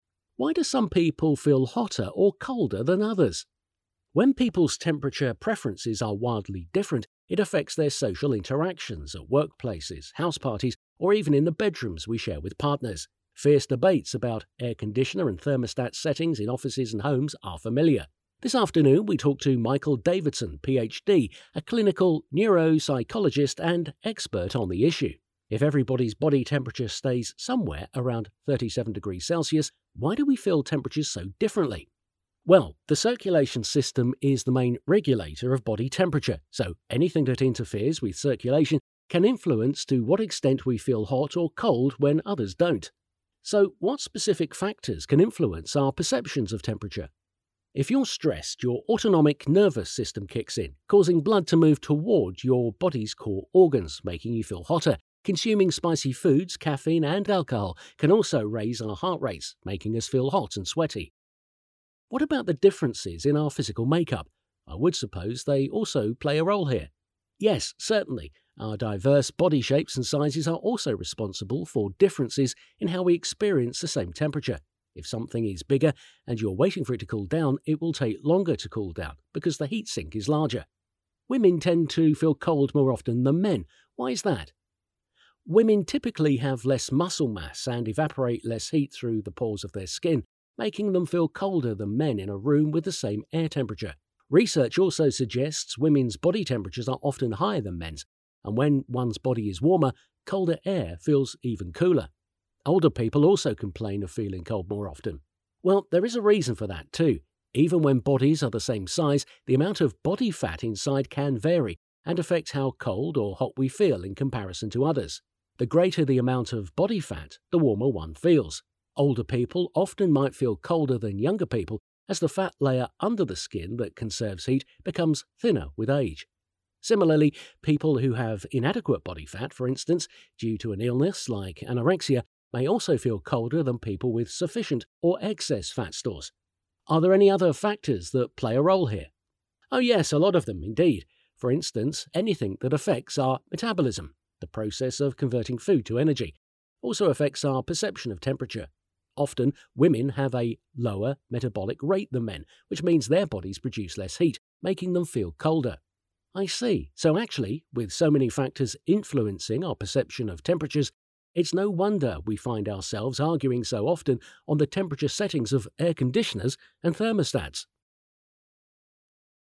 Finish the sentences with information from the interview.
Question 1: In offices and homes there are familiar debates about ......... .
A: air conditioner and thermostat settings

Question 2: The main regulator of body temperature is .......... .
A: the circulatory system

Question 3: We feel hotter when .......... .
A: we are stressed and when we consume spicy foods, caffeine, and alcohol

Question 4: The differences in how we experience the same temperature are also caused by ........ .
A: diverse body shapes and sizes

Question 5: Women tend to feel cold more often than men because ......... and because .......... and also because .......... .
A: (typically) they have less muscle mass and evaporate less heat

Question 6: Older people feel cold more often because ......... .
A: the fat layer under the skin that conserves heat becomes thinner with age

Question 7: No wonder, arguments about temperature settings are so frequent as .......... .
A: so many factors influence our perception of temperatures

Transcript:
Why Do Some People Feel Hotter or Colder Than Others?
Host: When people's temperature preferences are wildly different, it affects their social interactions — at workplaces, house parties, or even in the bedrooms we share with partners. Fierce debates about air conditioner and thermostat settings in offices and homes are familiar. This afternoon we talk to Michael Davidson, PhD, a clinical neuropsychologist, and an expert on the issue. If everyone's body temperature stays somewhere around 37 degrees Celsius, why do we feel temperatures so differently?
MD: Well, the circulatory system is the main regulator of body temperature. So, anything that interferes with circulation can influence to what extent we feel hot or cold when others don't.
H: So, what specific factors can influence our perceptions of temperature?
MD: If you're stressed, your autonomic nervous system kicks in, causing blood to move toward your body's core organs, making you feel hotter. Consuming spicy foods, caffeine, and alcohol can also raise our heart rates, making us feel hot and sweaty.
H: What about the differences in our physical makeup? I would suppose they also play a role here.
MD: Yes, certainly. Our diverse body shapes and sizes are also responsible for differences in how we experience the same temperature. If something is bigger and you're waiting for it to cool down, it will take longer to cool down because the heat sink is larger.
H: Women tend to feel cold more often than men. Why is that?
MD: Women typically have less muscle mass and evaporate less heat through the pores in their skin, making them feel colder than men in a room with the same air temperature. Research also suggests women's body temperatures are often higher than men's, and when one's body is warm, colder air feels even cooler.
H: Older people also complain of feeling cold more often.
MD: Well, there is a reason for that, too. Even when bodies are the same size, the amount of body fat inside can vary and affect how cold or hot we feel in comparison to others. The greater the amount of body fat, the warmer one feels. Older people often might feel colder than younger people, as the fat layer under the skin that conserves heat becomes thinner with age. Similarly, people who have inadequate body fat, for instance, due to an illness like anorexia, may also feel colder than people with sufficient or excess fat stores.
H: Are there other factors that play a role here?
MD: Oh yes. A lot of them, indeed. For instance, anything that affects our metabolism — the process of converting food to energy — also affects our perception of temperature. Often, women have a lower metabolic rate than men, which means their bodies produce less heat, making them feel colder.
H: I see. So actually, with so many factors influencing our perception of temperatures, it's no wonder we find ourselves arguing so often on the temperature settings of air conditioners and thermostats.

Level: Hallás utáni értés felsőfok